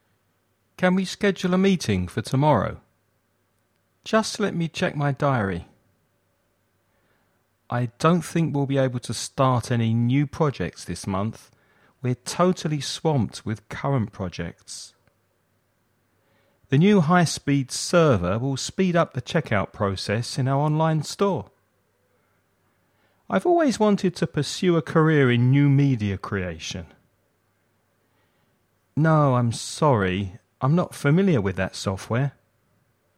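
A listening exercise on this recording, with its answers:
Choose the best words for each sentence.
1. Just let me check my .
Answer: diary

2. I don't think we'll be able start any new projects this month. We're totally with current projects.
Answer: swamped

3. The new high-speed server will the checkout process in our online store.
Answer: speed up

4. I've always wanted to a career in new media creation.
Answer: pursue

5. No, I'm sorry. I'm not on that software.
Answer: familiar with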